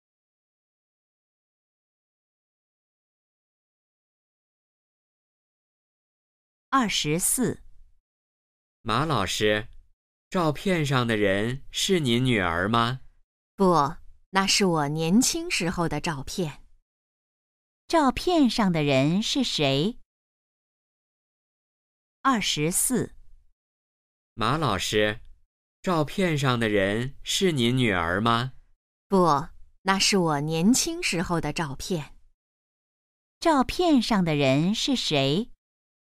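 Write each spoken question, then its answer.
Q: 照片上的人是谁?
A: 马老师自己(年轻时)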